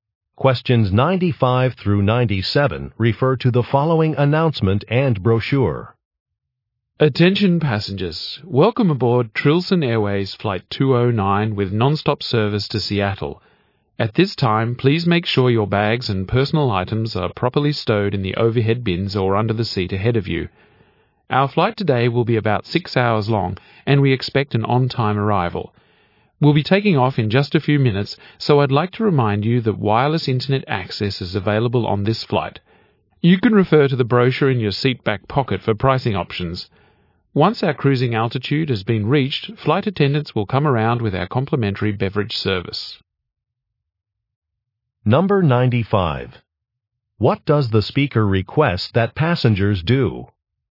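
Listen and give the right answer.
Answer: Stow their bags and personal items properly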